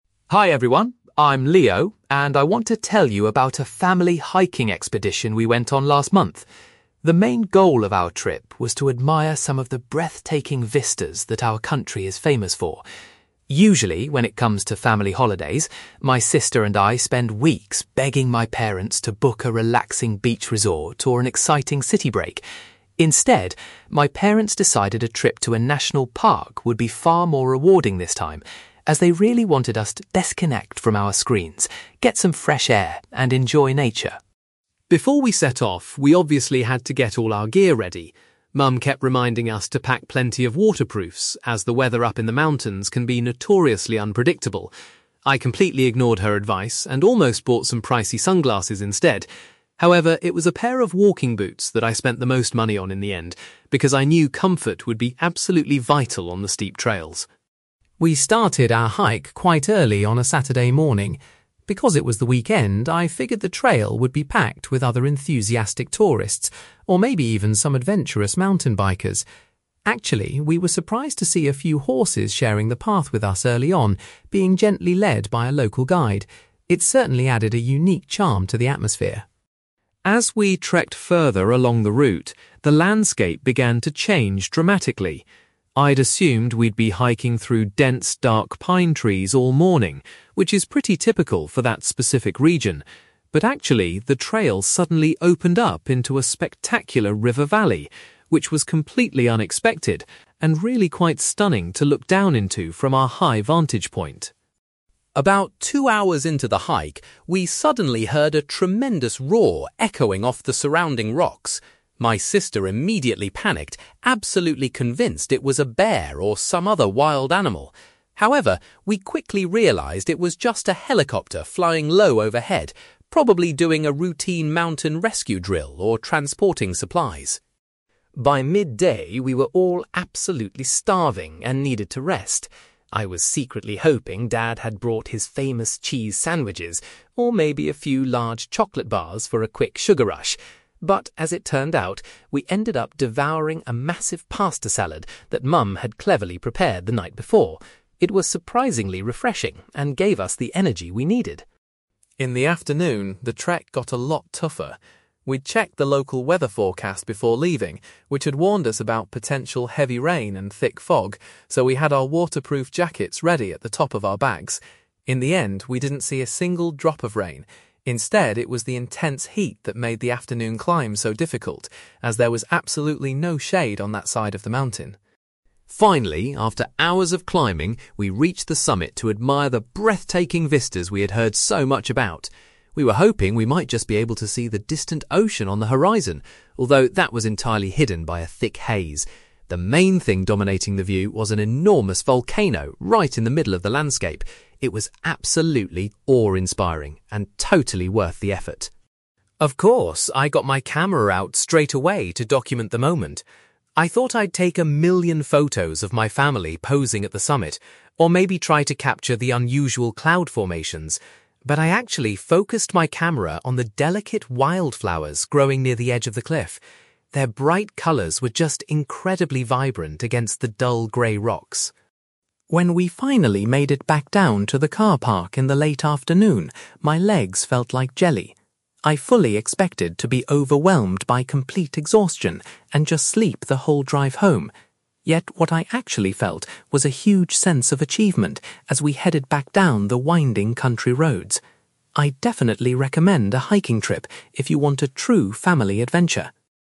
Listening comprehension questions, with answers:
You will hear a teenage boy called Leo giving a presentation about a recent family hiking expedition. For questions 9-18, complete the sentences with a word or short phrase.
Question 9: Leo's parents chose a (9)........................... for the family trip rather than a beach holiday or city break.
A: national park

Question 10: Despite thinking about buying sunglasses, Leo's most expensive purchase was some (10)........................... for the journey.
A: walking boots

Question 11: At the beginning of the hike, Leo was unexpectedly greeted by the sight of some (11)........................... on the trail.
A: horses

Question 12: Instead of the pine trees Leo anticipated, the hiking route eventually revealed a beautiful (12)........................... .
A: river valley

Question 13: A loud noise frightened Leo's sister until they noticed a (13)........................... in the sky above them.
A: helicopter

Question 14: For their midday meal, the family eagerly ate the (14)........................... that had been made the previous evening.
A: pasta salad

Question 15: Leo explains that the extreme (15)........................... caused problems during the afternoon, rather than the predicted rain.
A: heat

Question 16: From the top of the mountain, a huge (16)........................... caught the family's attention since the ocean was not visible.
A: volcano

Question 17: Leo spent time taking close-up photographs of the (17)........................... instead of his relatives.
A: wild flowers

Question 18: At the end of the day, Leo experienced a strong feeling of (18)........................... which replaced his tiredness.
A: achievement

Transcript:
Leo: Hi everyone, I'm Leo, and I want to tell you about a family hiking expedition we went on last month. The main goal of our trip was to admire some of the breathtaking vistas that our country is famous for. Usually, when it comes to family holidays, my sister and I spend weeks begging my parents to book a relaxing beach resort or an exciting city break. Instead, my parents decided a trip to a national park would be far more rewarding this time, as they really wanted us to disconnect from our screens, get some fresh air, and enjoy nature.
Before we set off, we obviously had to get all our gear ready. Mum kept reminding us to pack plenty of waterproofs, as the weather up in the mountains can be notoriously unpredictable. I completely ignored her advice and almost bought some pricey sunglasses instead. However, it was a pair of walking boots that I spent the most money on in the end, because I knew comfort would be absolutely vital on the steep trails.
We started our hike quite early on a Saturday morning. Because it was the weekend, I figured the trail would be packed with other enthusiastic tourists, or maybe even some adventurous mountain bikers. Actually, we were surprised to see a few horses sharing the path with us early on, being gently led by a local guide. It certainly added a unique charm to the atmosphere!
As we trekked further along the route, the landscape began to change dramatically. I'd assumed we'd be hiking through dense, dark pine trees all morning, which is pretty typical for that specific region. But actually, the trail suddenly opened up into a spectacular river valley, which was completely unexpected and really quite stunning to look down into from our high vantage point.
About two hours into the hike, we suddenly heard a tremendous roar echoing off the surrounding rocks. My sister immediately panicked, absolutely convinced it was a bear or some other wild animal! However, we quickly realised it was just a helicopter flying low overhead, probably doing a routine mountain rescue drill or transporting supplies.
By midday, we were all absolutely starving and needed to rest. I was secretly hoping dad had brought his famous cheese sandwiches, or maybe a few large chocolate bars for a quick sugar rush. But as it turned out, we ended up devouring a massive pasta salad that mum had cleverly prepared the night before. It was surprisingly refreshing and gave us the energy we needed!
In the afternoon, the trek got a lot tougher. We'd checked the local weather forecast before leaving, which had warned us about potential heavy rain and thick fog, so we had our waterproof jackets ready at the top of our bags. In the end, we didn't see a single drop of rain; instead, it was the intense heat that made the afternoon climb so difficult, as there was absolutely no shade on that side of the mountain.
Finally, after hours of climbing, we reached the summit to admire the breathtaking vistas we had heard so much about. We were hoping we might just be able to see the distant ocean on the horizon. Although that was entirely hidden by a thick haze, the main thing dominating the view was an enormous volcano right in the middle of the landscape. It was absolutely awe-inspiring and totally worth the effort.
Of course, I got my camera out straight away to document the moment. I thought I'd take a million photos of my family posing at the summit, or maybe try to capture the unusual cloud formations. But I actually focused my camera on the delicate wild flowers growing near the edge of the cliff. Their bright colours were just incredibly vibrant against the dull grey rocks.
When we finally made it back down to the car park in the late afternoon, my legs felt like jelly. I fully expected to be overwhelmed by complete exhaustion and just sleep the whole drive home. Yet, what I actually felt was a huge sense of achievement as we headed back down the winding country roads. I'd definitely recommend a hiking trip if you want a true family adventure!

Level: B2